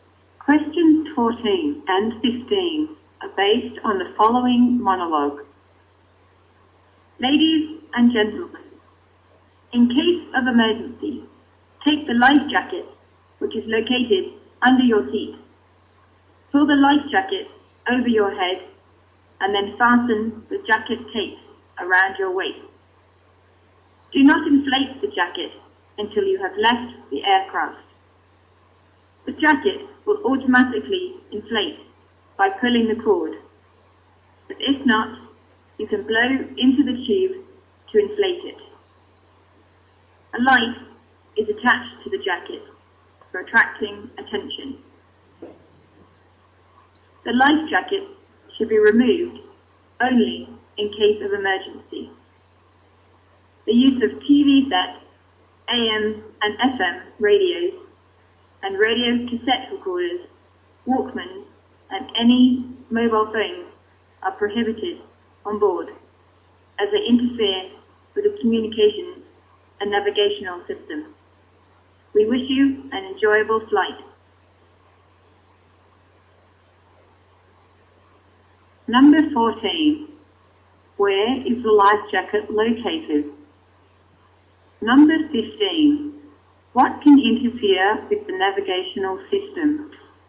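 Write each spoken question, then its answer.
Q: Where is the life jacket located?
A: Under the seat

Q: What can interfere with the navigational system?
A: TV sets, radios, cassette recorders, Walkmans and mobile phones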